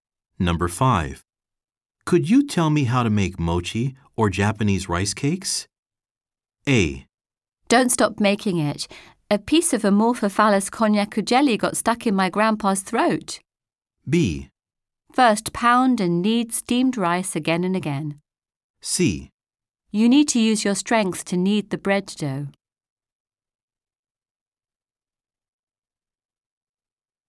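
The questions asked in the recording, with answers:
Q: Could you tell me how to make mochi or Japanese rice cakes?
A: B: First, pound and knead steamed rice again and again.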